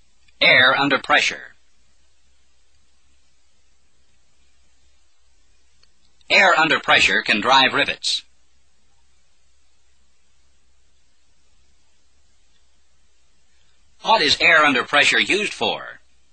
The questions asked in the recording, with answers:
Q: What is air under pressure used for?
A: To drive rivets. Air under pressure is used to drive rivets.